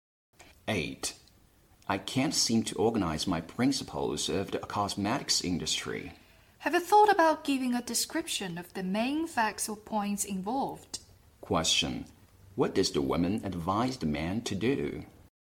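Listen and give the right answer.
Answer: Describe the main facts or points involved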